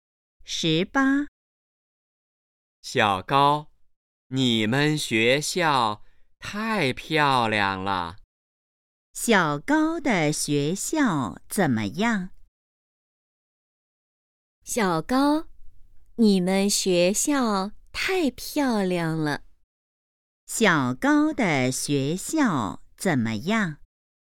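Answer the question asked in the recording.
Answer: 很漂亮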